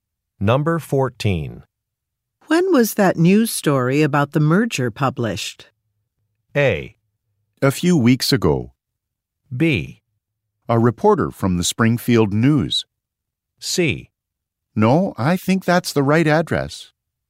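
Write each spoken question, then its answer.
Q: When was that news story about the merger published?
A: A: A few weeks ago.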